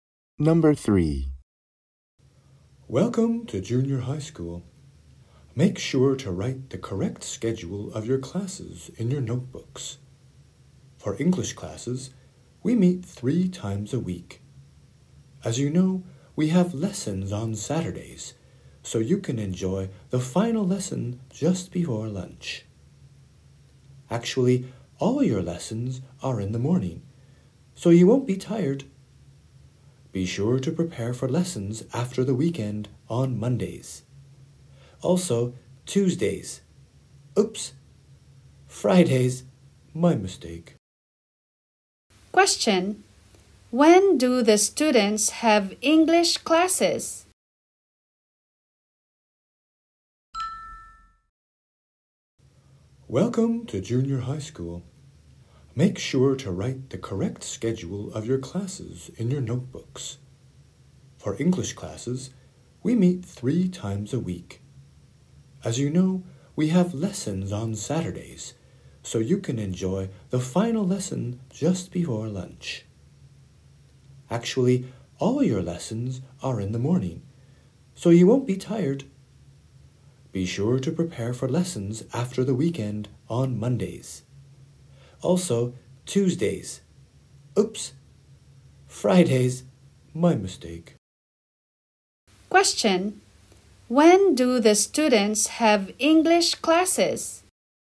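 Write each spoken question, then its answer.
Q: Question: When do the students have English classes?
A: Monday, Friday and Saturday mornings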